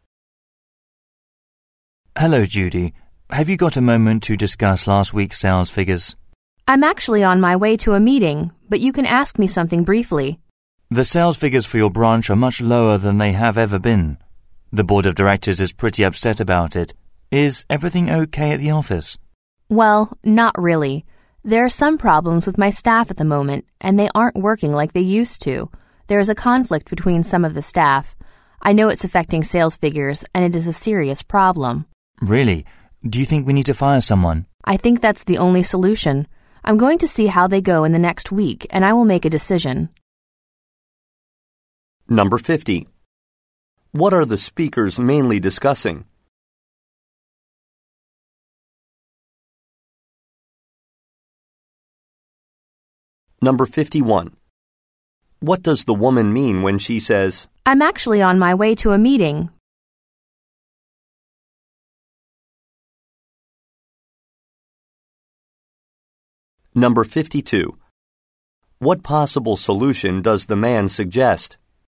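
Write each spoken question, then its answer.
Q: What are the speakers mainly discussing?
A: The branch's low sales figures

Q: What does the woman mean when she says, I'm actually on my way to a meeting?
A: She has only a little time to talk

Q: What possible solution does the man suggest?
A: Firing someone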